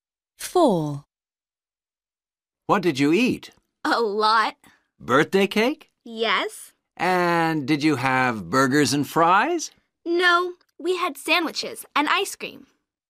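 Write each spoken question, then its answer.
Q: What did you eat?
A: birthday cake, sandwiches and ice cream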